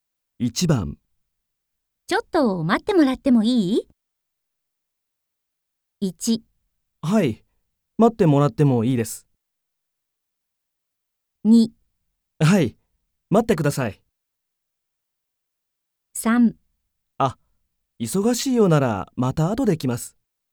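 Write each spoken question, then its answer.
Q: ちょっと待ってもらってもいい?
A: 3: あ、忙しいようならまた後で来ます。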